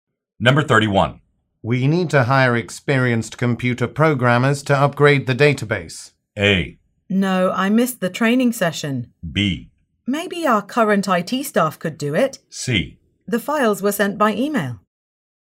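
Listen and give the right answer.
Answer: B: Maybe our current IT staff could do it.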